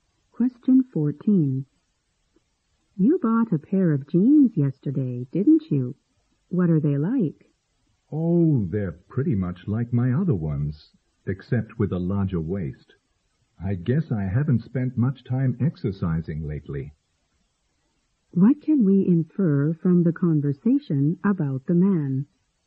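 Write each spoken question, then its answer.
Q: What can we infer from the conversation about the man?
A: He has put on weight because he hasn't exercised much lately.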